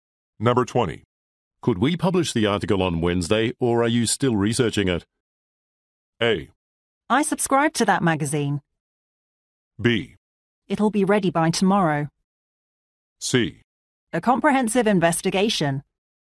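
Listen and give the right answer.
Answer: B: It'll be ready by tomorrow.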